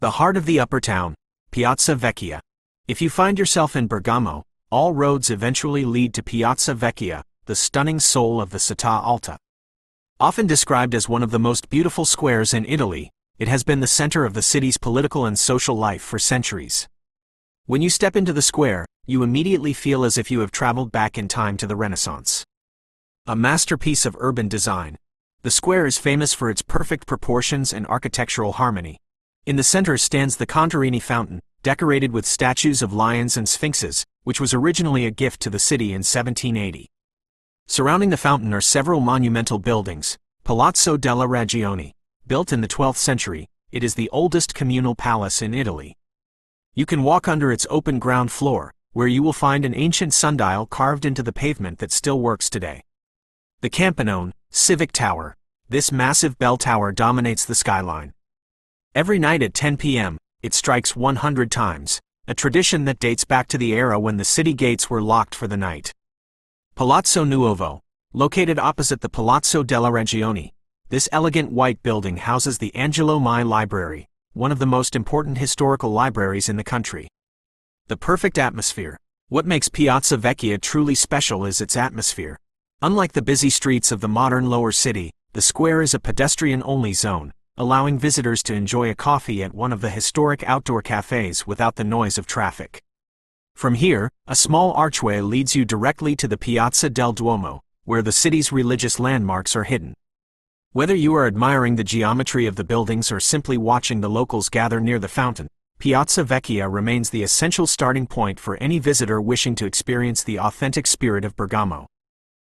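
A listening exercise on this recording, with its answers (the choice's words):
Listen to the audio about the Piazza Vecchia and answer the questions.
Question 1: What is the general architectural feel of Piazza Vecchia described in the text?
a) A mixture of modern skyscrapers and ancient ruins.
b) A harmonious space that reflects the Renaissance period.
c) A chaotic but charming commercial district.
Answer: A harmonious space that reflects the Renaissance period.

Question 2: What is unique about the sundial at the Palazzo della Ragione?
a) It is located at the top of the Civic Tower.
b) It is a modern digital installation.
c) It is carved into the ground and is still functional.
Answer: It is carved into the ground and is still functional.

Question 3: Why does the "Campanone" bell strike 100 times every night?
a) To celebrate the construction of the Angelo Mai Library.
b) To maintain a historical tradition related to the city's security.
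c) To signal the start of a religious ceremony in the Duomo.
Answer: To maintain a historical tradition related to the city's security.

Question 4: How does the atmosphere in Piazza Vecchia differ from the lower city?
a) It is much noisier due to the large number of tourists.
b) It is more peaceful because cars are not allowed.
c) It is more industrial and focused on business.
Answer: It is more peaceful because cars are not allowed.

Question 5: Which building serves as a significant historical library?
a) Palazzo Nuovo.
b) Palazzo della Ragione.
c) The Contarini Fountain.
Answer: Palazzo Nuovo.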